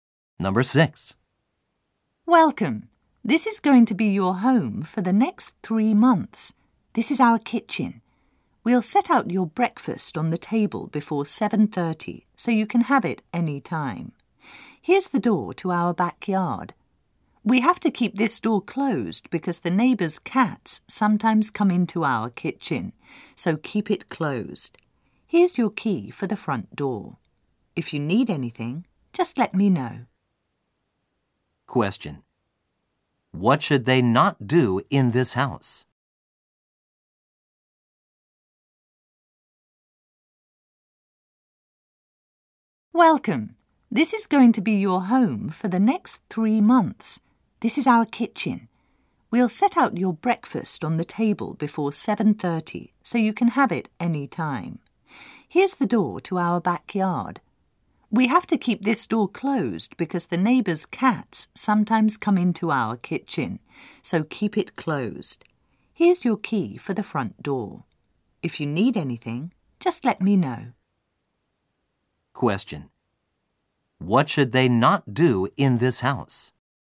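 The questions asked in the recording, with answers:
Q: What should they not do in this house?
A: Leave the backyard door open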